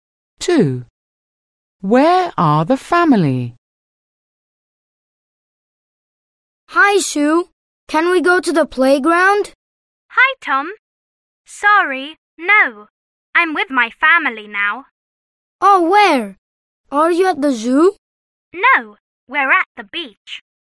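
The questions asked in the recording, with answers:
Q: Where are the family?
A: At the beach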